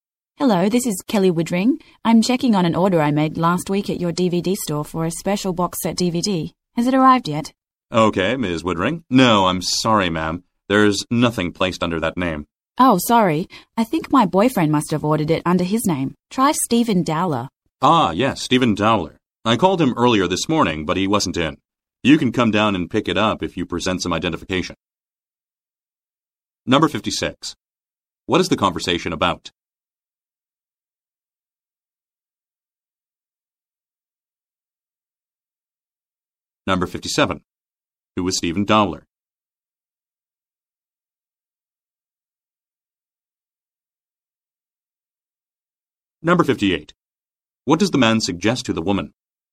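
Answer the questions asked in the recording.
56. Checking on a DVD order
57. The woman's boyfriend
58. Come pick up the DVD with identification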